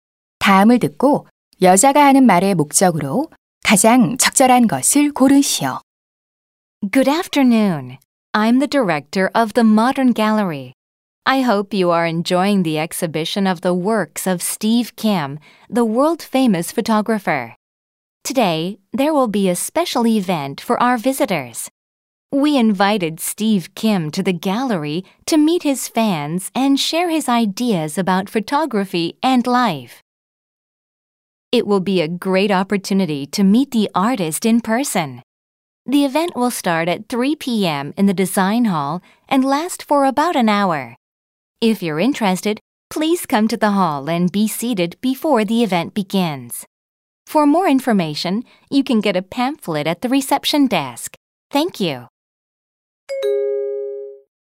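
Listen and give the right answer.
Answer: 사진작가 Steve Kim을 만나는 특별 행사를 안내하려고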